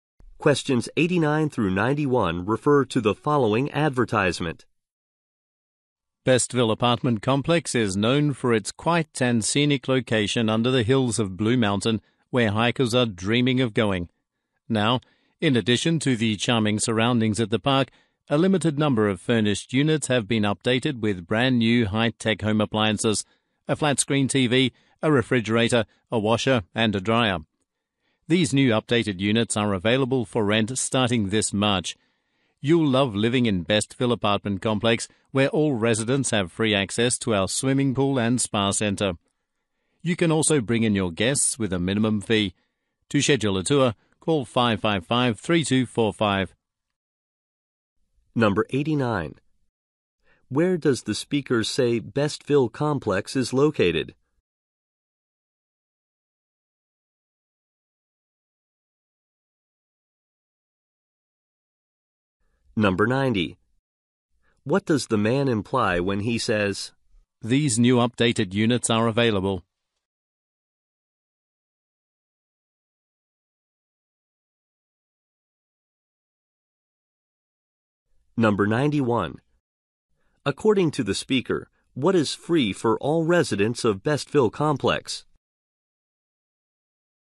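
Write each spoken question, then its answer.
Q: Where does the speaker say Bestville Complex is located?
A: Under the hills of Blue Mountain

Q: According to the speaker, what is free for all residents of Bestville Complex?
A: Access to the swimming pool and spa center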